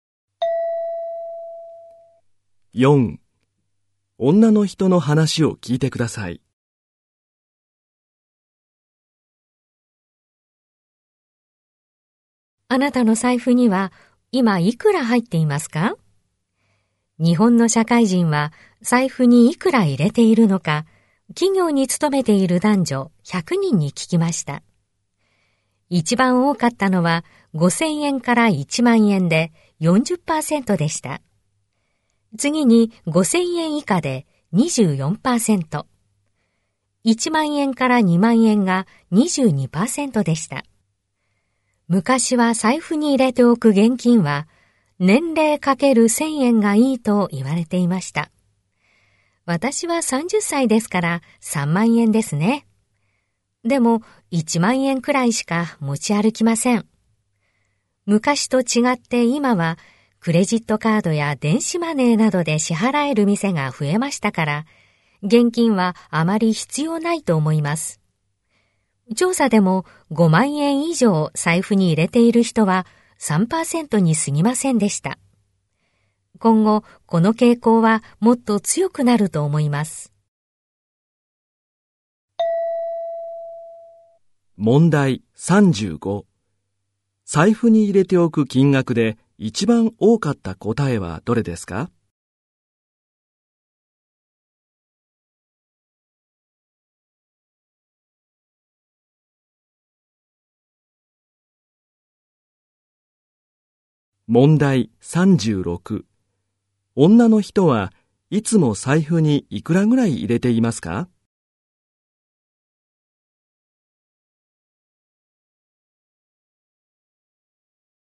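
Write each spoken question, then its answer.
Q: 財布に入れておく金額で一番多かった答えはどれですか?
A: 5000円から1万円

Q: いつも財布にいくらぐらい入れていますか?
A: 1万円くらい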